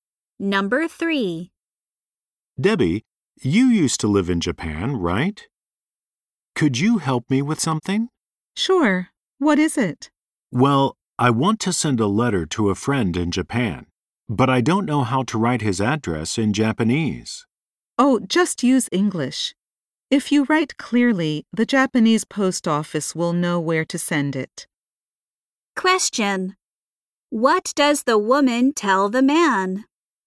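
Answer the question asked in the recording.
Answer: He can write the address in English.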